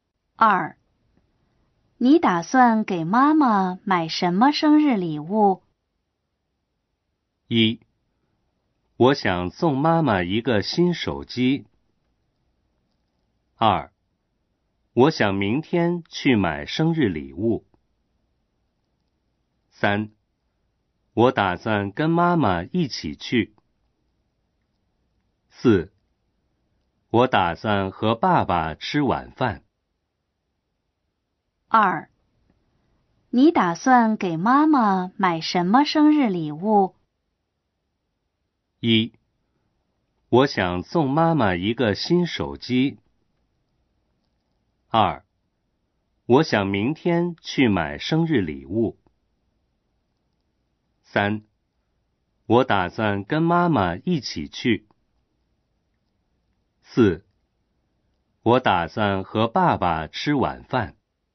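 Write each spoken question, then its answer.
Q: 你打算给妈妈买什么生日礼物?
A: 一: 我想送妈妈一个新手机。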